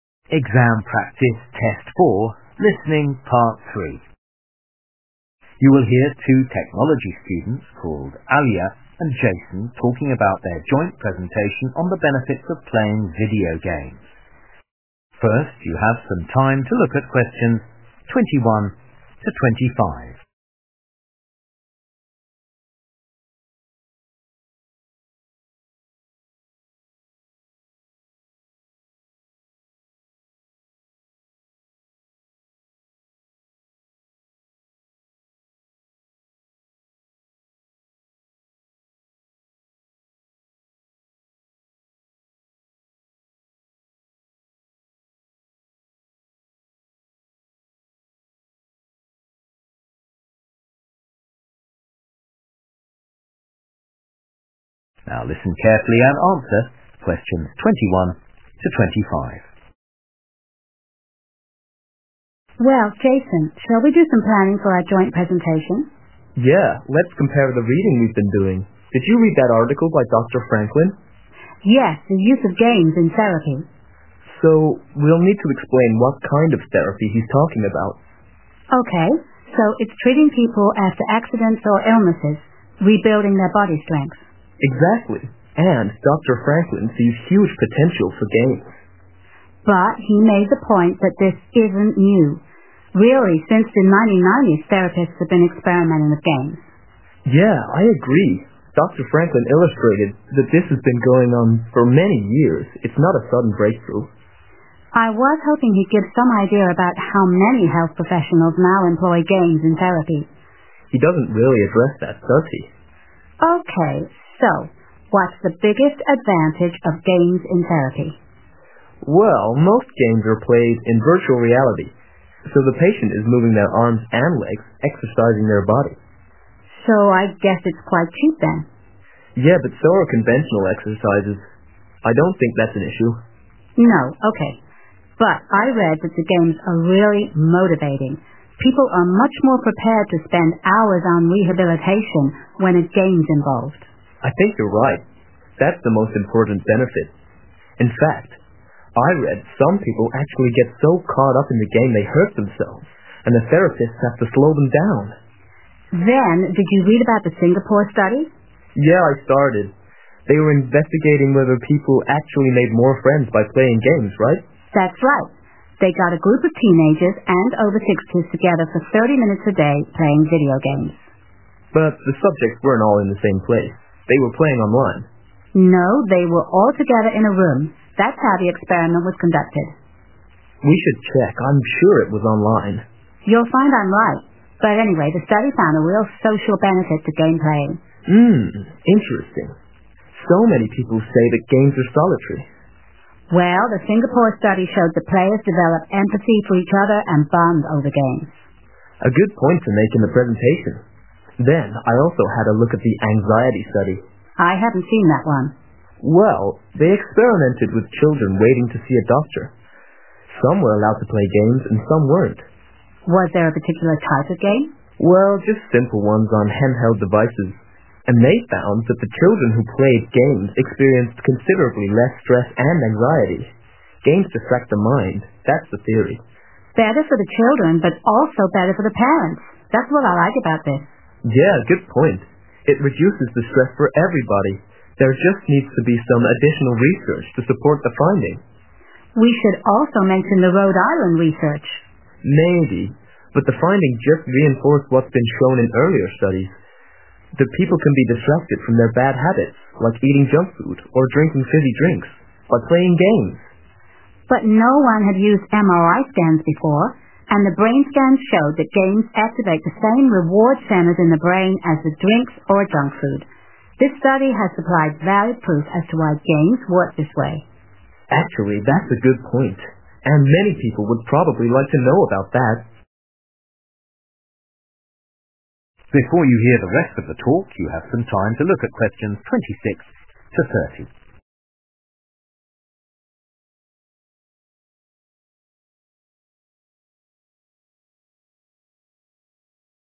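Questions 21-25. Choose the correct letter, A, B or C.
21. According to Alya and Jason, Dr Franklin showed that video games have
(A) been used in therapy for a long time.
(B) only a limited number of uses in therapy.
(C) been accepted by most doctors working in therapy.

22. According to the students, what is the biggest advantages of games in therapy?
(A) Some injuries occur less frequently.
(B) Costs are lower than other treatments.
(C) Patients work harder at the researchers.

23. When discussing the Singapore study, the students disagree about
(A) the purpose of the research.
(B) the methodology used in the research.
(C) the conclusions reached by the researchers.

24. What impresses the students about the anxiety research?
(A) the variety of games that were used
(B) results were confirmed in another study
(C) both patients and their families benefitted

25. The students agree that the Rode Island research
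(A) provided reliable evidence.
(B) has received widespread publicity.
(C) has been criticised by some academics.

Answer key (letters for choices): 21A, 22C, 23B, 24C, 25A

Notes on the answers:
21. Alya: Yes, the use of games in therapy. Jason: So, we'll need to explain what kind of 'therapy' he's talking about Alya: OK, so it's treating people after accidents or illnesses – rebuilding their body strength. Jason: Exactly. And Dr Franklin sees huge potential for games. Alya: But he made the point that this isn't new. Really, since the 1990s, therapists have been experimenting with games (Nhưng anh ấy đã đưa ra quan điểm rằng điều này không phải là mới. Thực sự, từ những năm 1990, các nhà trị liệu đã thử nghiệm với các trò chơi).
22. Jason: Yeah, but so are conventional exercises. I don't think that's an issue. Alya: No, OK. But I read that the games are really motivating. People are much more prepared to spend hours on rehabilitation, when a game's involved.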